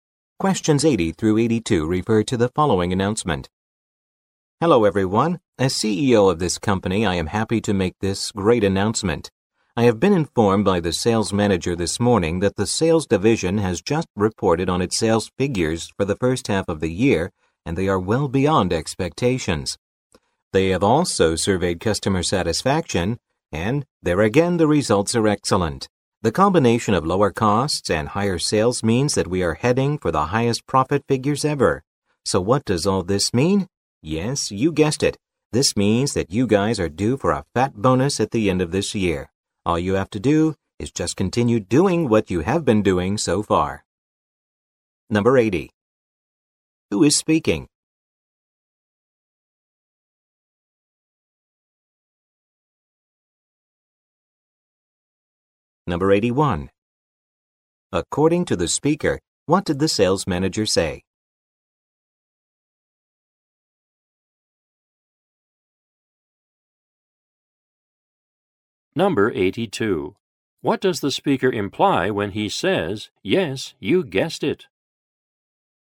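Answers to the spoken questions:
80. The CEO
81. First-half sales were well beyond expectations
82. Employees will get a big bonus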